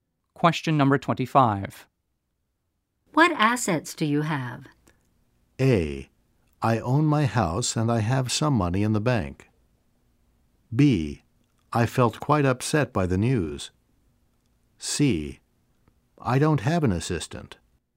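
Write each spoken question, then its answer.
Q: What assets do you have?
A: A: I own my house and I have some money in the bank.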